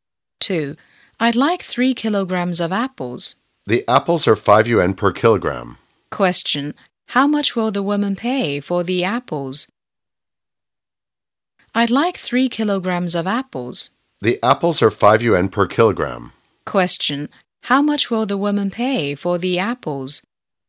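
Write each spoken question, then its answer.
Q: How much will the woman pay for the apples?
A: 15 yuan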